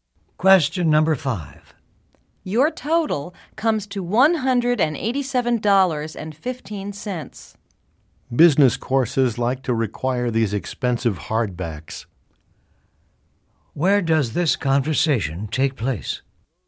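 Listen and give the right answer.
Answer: In a bookstore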